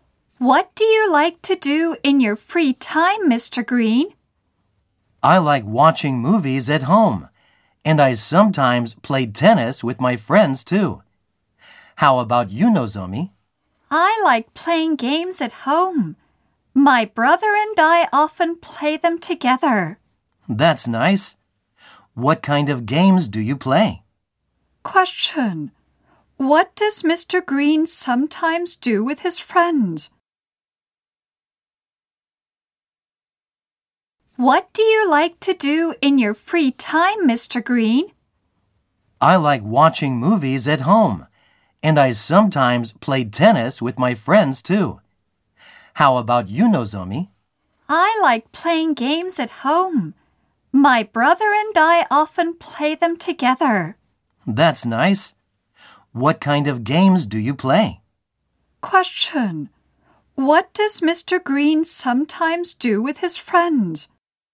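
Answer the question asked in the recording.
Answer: He plays tennis.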